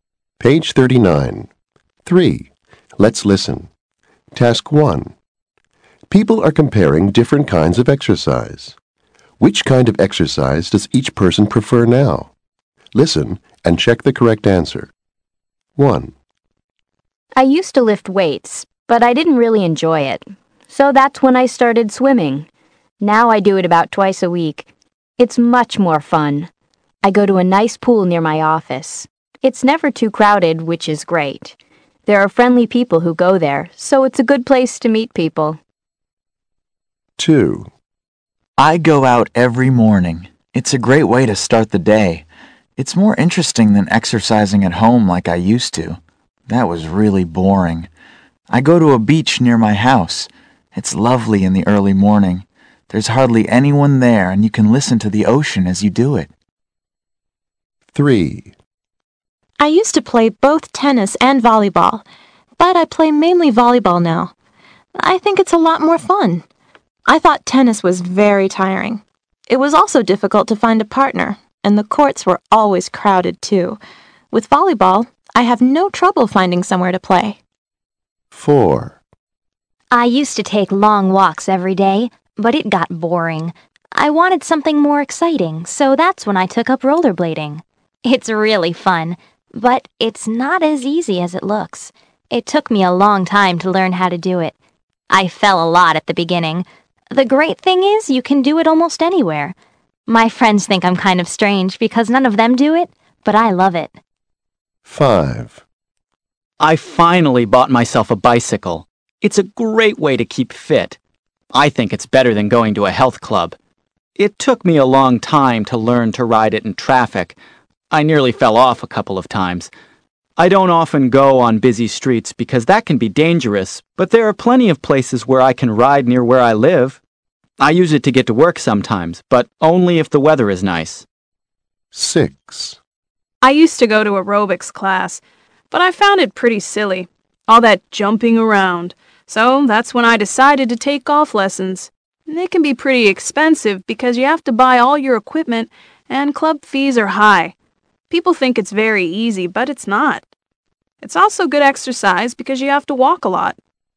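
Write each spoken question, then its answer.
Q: Which kind of exercise does each person prefer now?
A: Swimming

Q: Which kind of exercise does each person prefer now?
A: Volleyball

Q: Which kind of exercise does each person prefer now?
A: Rollerblading

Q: Which kind of exercise does each person prefer now?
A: Bicycling

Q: Which kind of exercise does each person prefer now?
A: Golf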